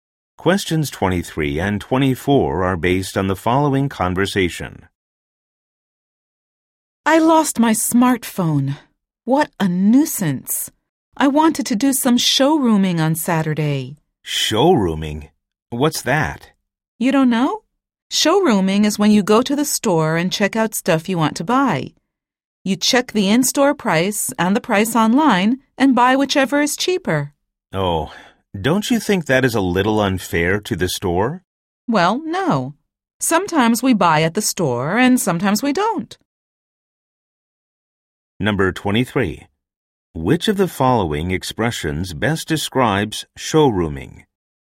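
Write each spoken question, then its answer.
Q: Which of the following expressions best describes showrooming?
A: Checking products in a store and buying wherever it is cheaper, in-store or online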